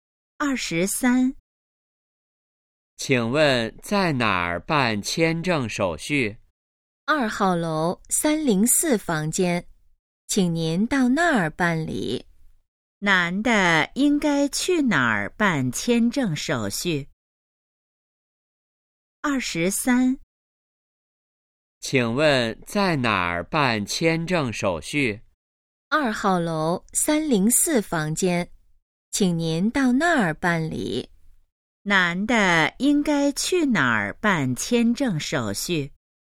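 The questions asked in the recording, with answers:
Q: 男的应该去哪儿办签证手续?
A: 二号楼304房间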